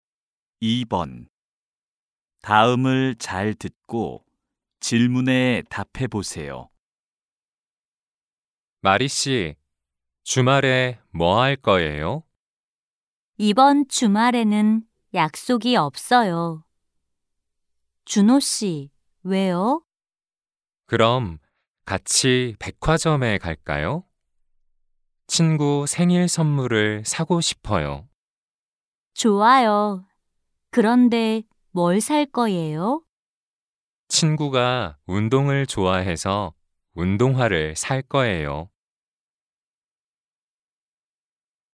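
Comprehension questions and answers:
[6-1~6-2] 다음을 잘 듣고 질문에 답해 보세요.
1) 두 사람은 주말에 더이에 갈 거예요?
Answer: 백화점

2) 주노 씨는 무엇을 살 거예요?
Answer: 운동화

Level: 1B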